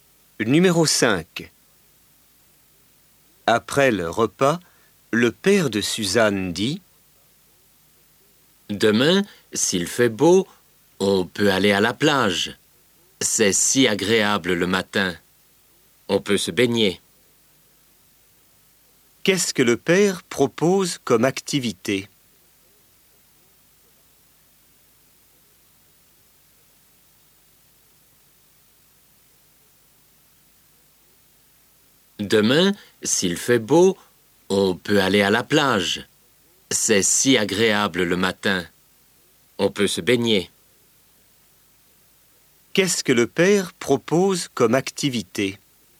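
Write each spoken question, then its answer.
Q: Qu'est-ce que le père propose comme activité?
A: Aller à la plage se baigner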